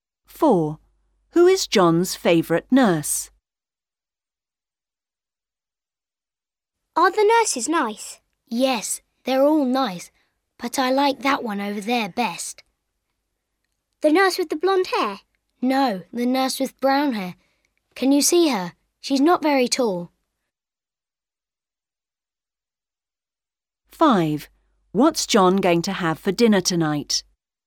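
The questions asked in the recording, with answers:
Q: Who is John's favourite nurse?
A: The nurse with brown hair who is not very tall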